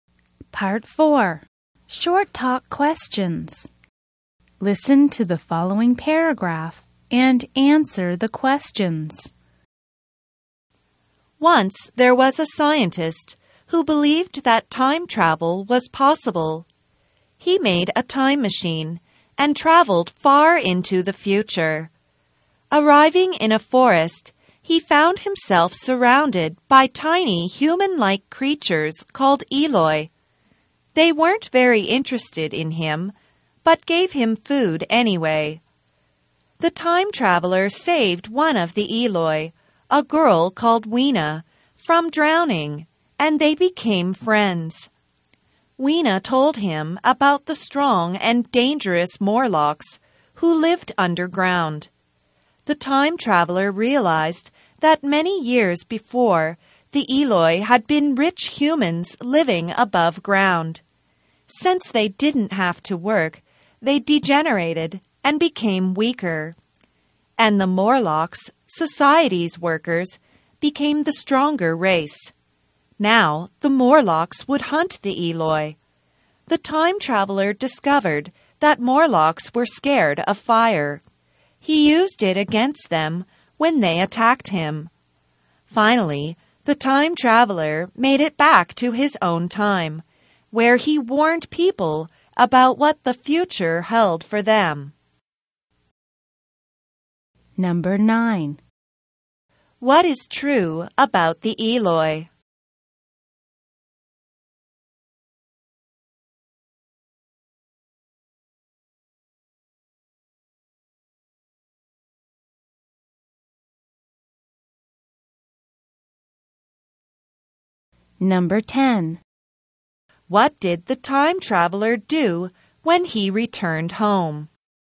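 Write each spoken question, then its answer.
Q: What did the time traveler do when he returned home?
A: He warned people about what the future held for them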